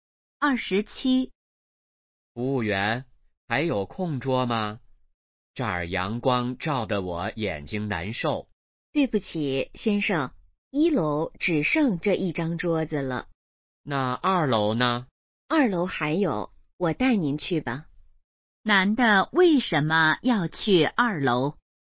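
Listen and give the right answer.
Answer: 1楼阳光照得眼睛难受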